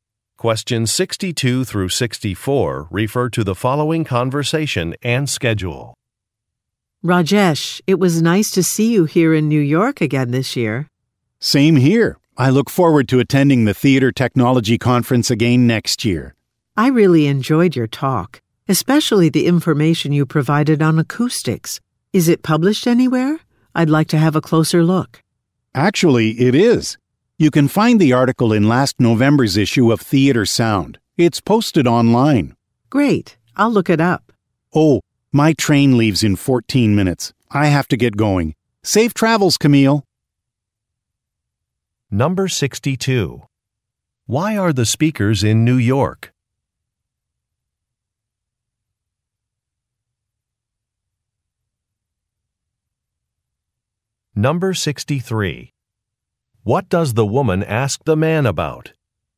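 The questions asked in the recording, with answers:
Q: Why are the speakers in New York?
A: To attend the Theater Technology Conference

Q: What does the woman ask the man about?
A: Whether his talk is published anywhere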